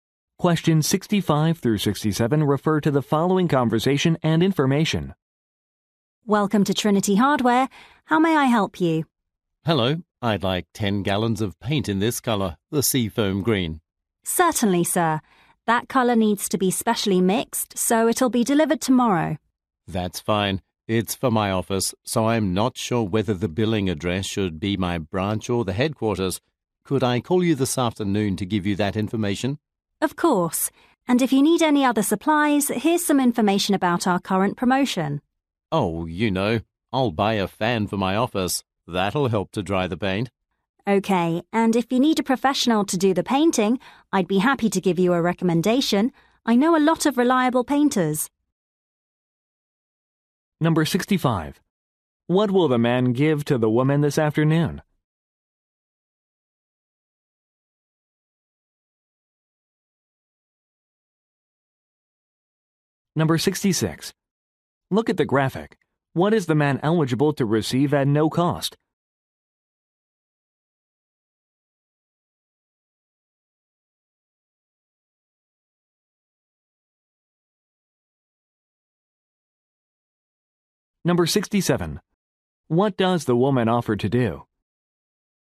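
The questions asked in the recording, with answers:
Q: What will the man give to the woman this afternoon?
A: The billing address

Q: What does the woman offer to do?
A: Recommend a professional painter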